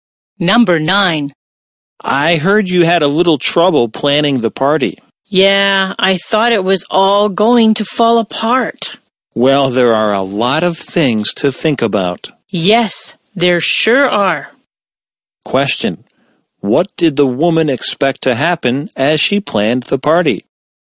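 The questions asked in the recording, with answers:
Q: What did the woman expect to happen as she planned the party?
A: She thought it would all fall apart.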